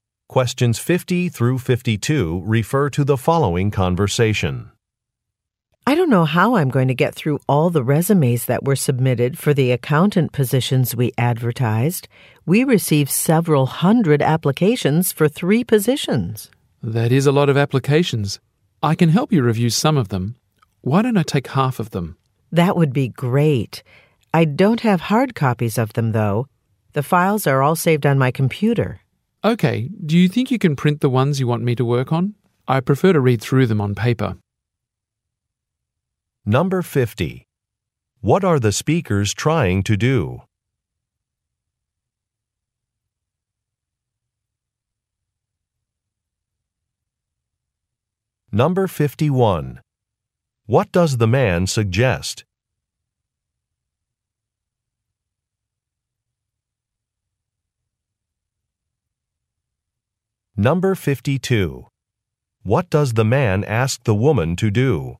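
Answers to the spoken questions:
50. Fill accountant positions by reviewing the submitted resumes
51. That he take half of the applications to review
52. Print the resumes he will work on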